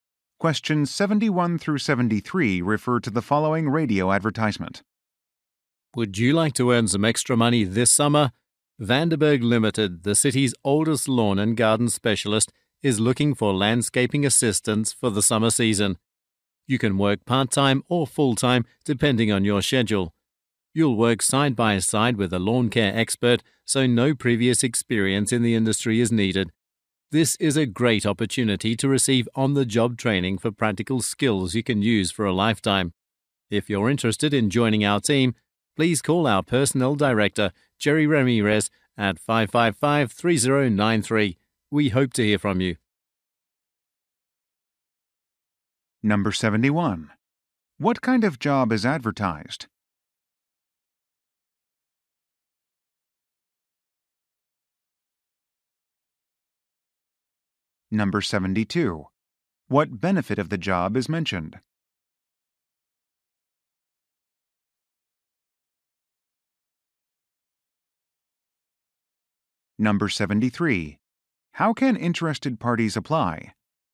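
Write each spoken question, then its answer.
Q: What kind of job is advertised?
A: Landscaping assistant (lawn and garden work)

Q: What benefit of the job is mentioned?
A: On-the-job training in practical skills

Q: How can interested parties apply?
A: By calling the personnel director, Jerry Ramirez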